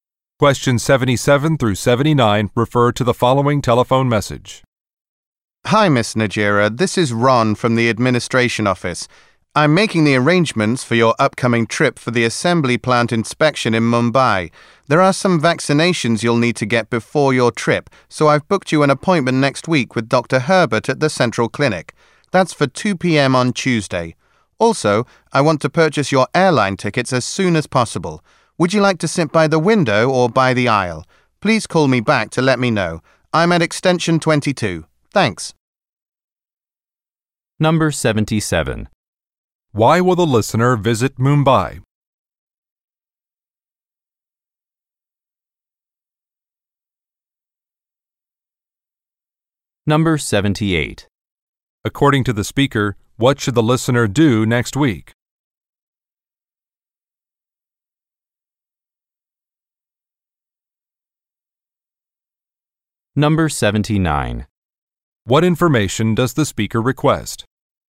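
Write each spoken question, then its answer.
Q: Why will the listener visit Mumbai?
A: To inspect an assembly plant

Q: According to the speaker, what should the listener do next week?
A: Get vaccinations at a clinic

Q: What information does the speaker request?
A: A seat preference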